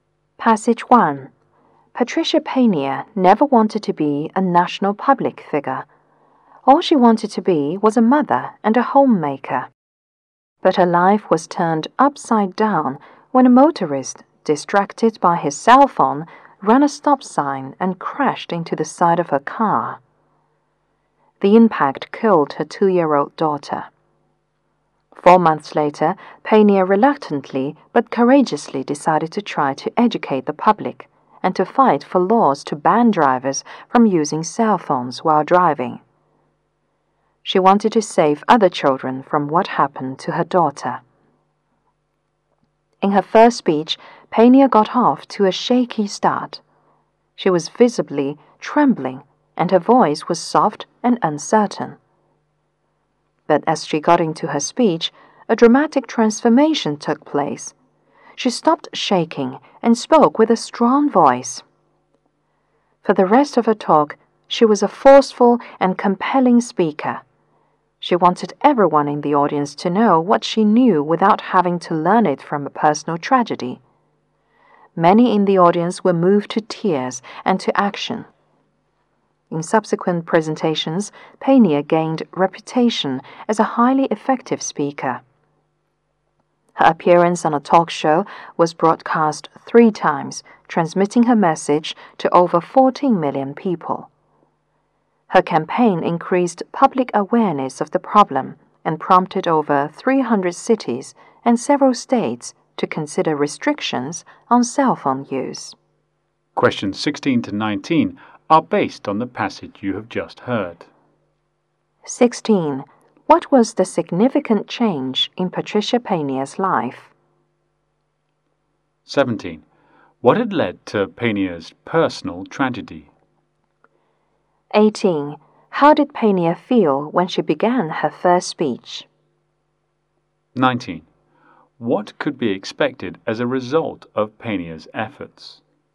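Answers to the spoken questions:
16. She went from homemaker to public campaigner against using cell phones while driving.
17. A driver distracted by his cell phone ran a stop sign and hit her car.
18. Nervous.
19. Restrictions on using cell phones while driving.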